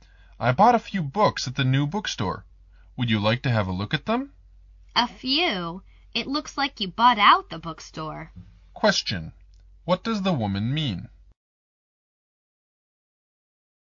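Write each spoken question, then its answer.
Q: What does the woman mean?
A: The man bought a lot of books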